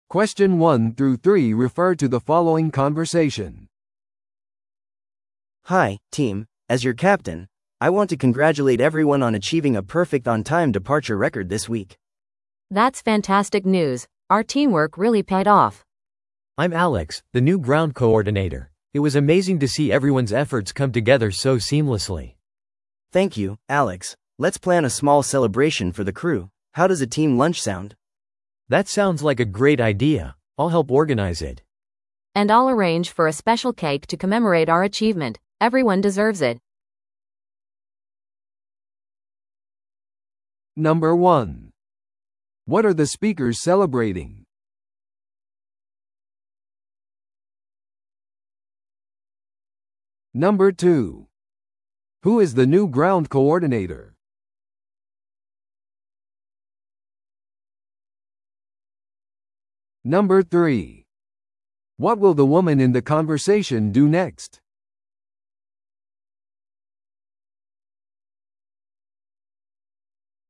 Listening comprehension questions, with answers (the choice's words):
Listen to the audio below and answer the questions.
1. What are the speakers celebrating?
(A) 他の航空会社との新しい提携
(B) チームが受賞した賞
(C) 時間通りの出発の完璧な記録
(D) 新しいグランドコーディネーターの最初の週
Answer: 時間通りの出発の完璧な記録

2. Who is the new ground coordinator?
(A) キャプテン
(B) アレックス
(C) ライリー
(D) 乗務員の一員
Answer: アレックス

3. What will the woman in the conversation do next?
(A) チームランチを準備する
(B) フライトスケジュールを準備する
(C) 新しいチームメンバーを歓迎する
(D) 特別な祝賀ケーキを注文する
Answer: 特別な祝賀ケーキを注文する

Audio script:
A: Hi, team. As your captain, I want to congratulate everyone on achieving a perfect on-time departure record this week!
B: That's fantastic news! Our teamwork really paid off.
C: I'm Alex, the new ground coordinator. It was amazing to see everyone's efforts come together so seamlessly.
A: Thank you, Alex. Let's plan a small celebration for the crew. How does a team lunch sound?
C: That sounds like a great idea! I'll help organize it.
B: And I'll arrange for a special cake to commemorate our achievement. Everyone deserves it!